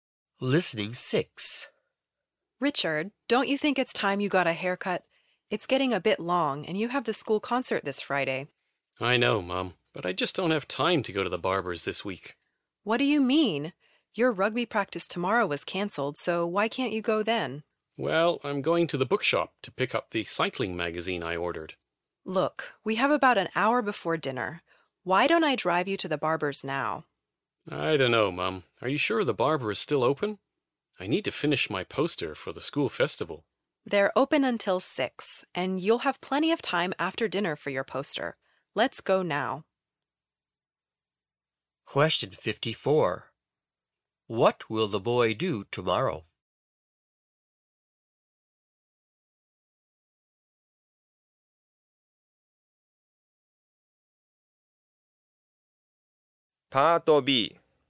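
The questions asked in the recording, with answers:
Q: What will the boy do tomorrow?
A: Go to the bookshop to pick up a cycling magazine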